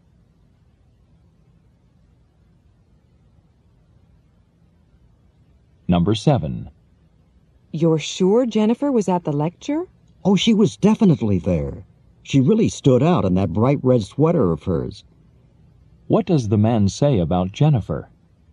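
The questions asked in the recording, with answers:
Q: What does the man say about Jennifer?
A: She was easy to notice in her bright red sweater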